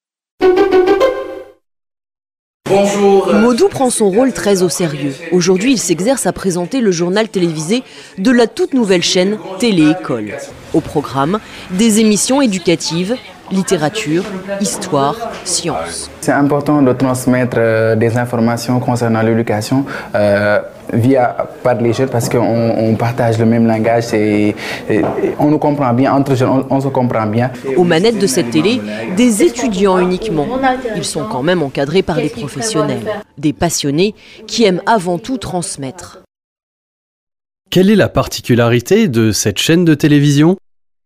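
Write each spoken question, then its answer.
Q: Quelle est la particularité de cette chaîne de télévision ?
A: Elle est gérée uniquement par des étudiants, encadrés par des professionnels.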